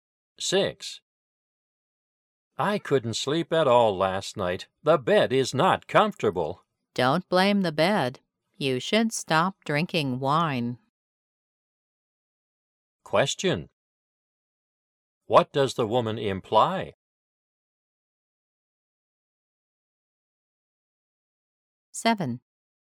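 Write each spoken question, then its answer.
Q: What does the woman imply?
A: Drinking wine kept the man awake, not the bed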